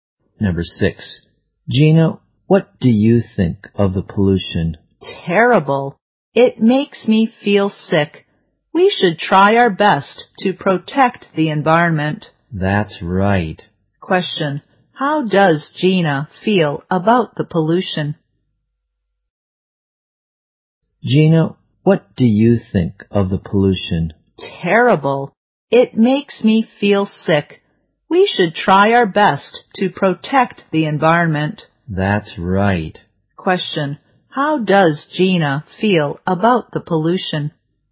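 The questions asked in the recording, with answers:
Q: Question, how does Gina feel about the pollution?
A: Terrible; it makes her feel sick.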